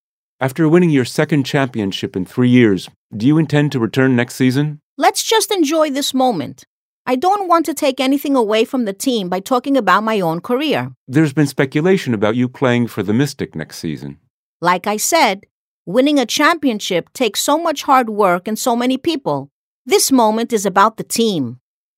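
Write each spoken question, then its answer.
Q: What does the woman imply?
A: She doesn't want to talk about her future plans right now; she wants to keep the focus on the team's win.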